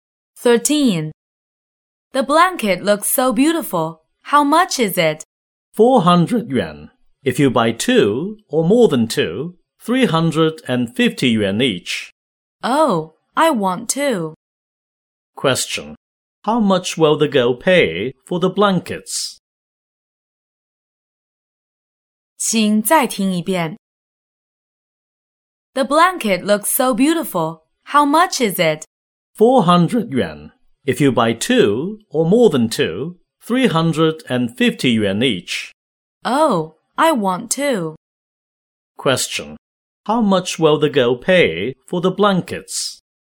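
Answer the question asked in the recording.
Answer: 700 yuan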